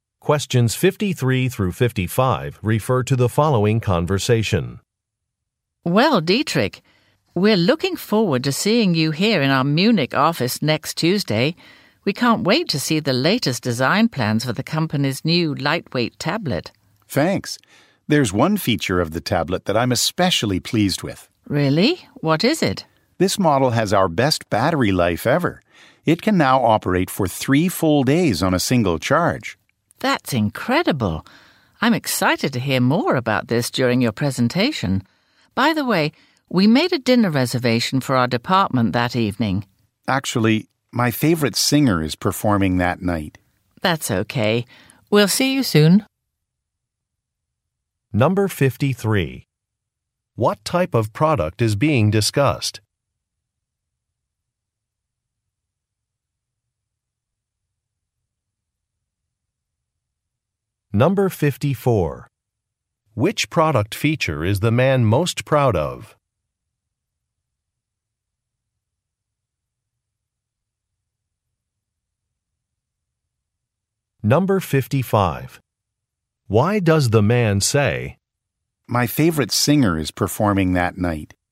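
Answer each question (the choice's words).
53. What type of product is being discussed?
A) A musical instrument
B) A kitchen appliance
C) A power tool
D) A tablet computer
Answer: A tablet computer

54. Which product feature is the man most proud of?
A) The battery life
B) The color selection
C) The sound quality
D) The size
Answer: The battery life

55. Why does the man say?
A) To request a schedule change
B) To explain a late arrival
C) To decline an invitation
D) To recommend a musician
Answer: To decline an invitation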